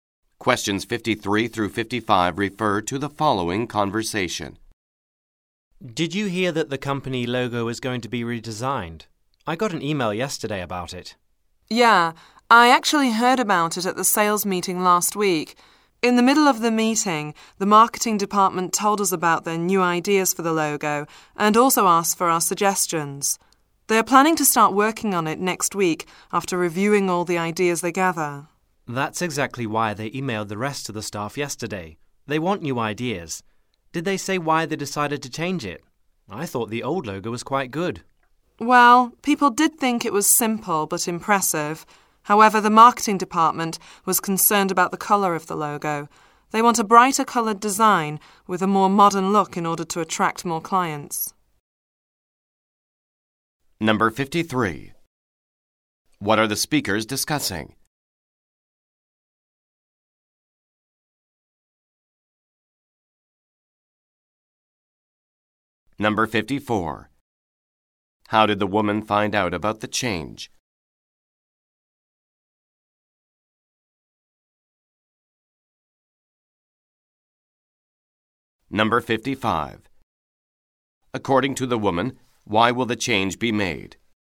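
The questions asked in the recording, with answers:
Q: What are the speakers discussing?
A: The redesign of the company logo

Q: According to the woman, why will the change be made?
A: To attract more clients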